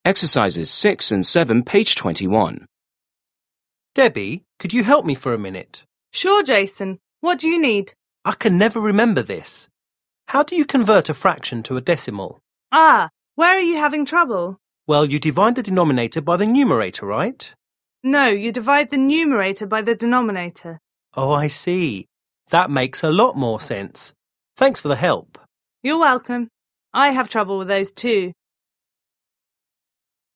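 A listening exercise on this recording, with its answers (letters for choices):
6. Listen to a conversation between a construction worker and a manager. Choose the correct answers.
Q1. What is the conversation mainly about?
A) reducing a fraction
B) working with mixed numbers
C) comparing decimals and fractions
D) converting a fraction to a decimal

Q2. How should the man write the result?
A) as a whole number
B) as a decimal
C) as a mixed number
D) as a percent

7. Listen again and complete the conversation.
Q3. Worker: I 1 ______ ______ ______ this. How do you convert a fraction to a decimal?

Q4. Manager: Ah, where are you 2 ____________?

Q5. Worker: Well, you 3 ______ __________ by the numerator,right?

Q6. Manager: No, you divide 4 ______ _______ by the denominator.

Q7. Worker: Oh, I see. That makes a lot 5 ___________. Thanks for the help.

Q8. Manager: You`re welcome. I 6 _________ with those, too.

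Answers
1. D
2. B
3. can never remember
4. having trouble
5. divide the denominator
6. the numerator
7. more sense
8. have trouble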